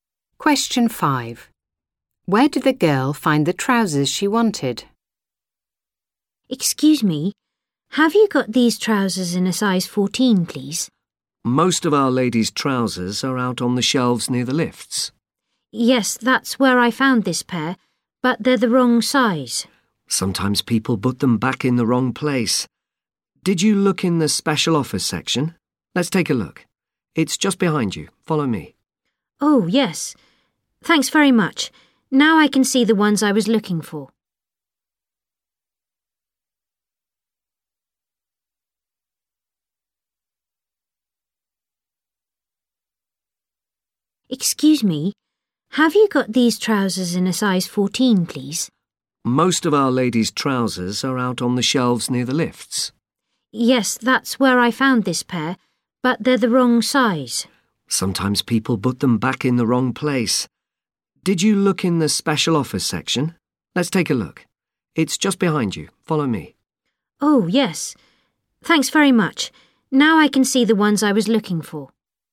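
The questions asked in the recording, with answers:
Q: Where did the girl find the trousers she wanted?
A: In the special offers section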